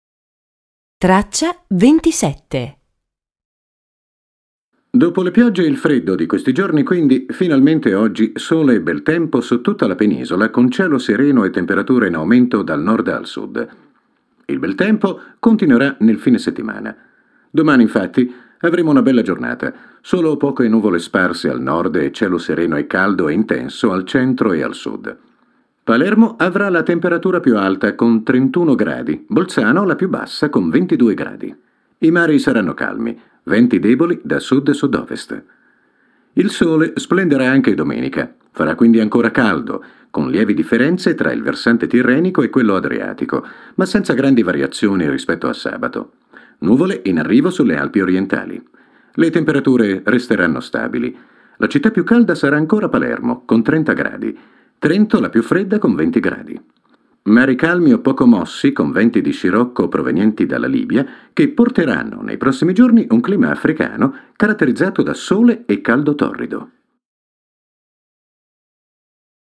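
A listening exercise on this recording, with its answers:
Ascolta e riempi il testo con le parole mancanti:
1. "Dopo le ____________ e il freddo di questi giorni quindi, finalmente oggi sole e ________ ________ su tutta la penisola,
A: piogge; bel tempo

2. con cielo sereno e temperature in ___________ dal Nord al Sud.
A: aumento

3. Domani __________ avremo una bella giornata,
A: infatti

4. solo poche ____________ sparse al Nord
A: nuvole

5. e cielo sereno e caldo intenso al centro e al ________.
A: sud

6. Palermo avrà la temperatura più alta. con 31 ____________,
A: gradi

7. I mari saranno _________.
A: calmi

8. Venti _____________ da sud e sud ovest.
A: deboli

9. con __________ differenze tra il versante tirrenico e quello adriatico,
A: lievi

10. ma ______________ grandi variazioni rispetto a sabato.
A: senza

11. Le temperature resteranno _________.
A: stabili

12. Mari calmi o _____________ ________________,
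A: poco mossi

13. che porteranno nei prossimi giorni un clima ________________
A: africano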